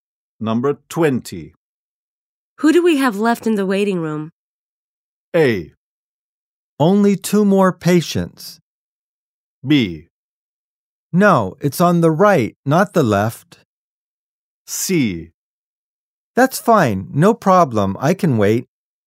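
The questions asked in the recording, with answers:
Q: Who do we have left in the waiting room?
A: A: Only two more patients.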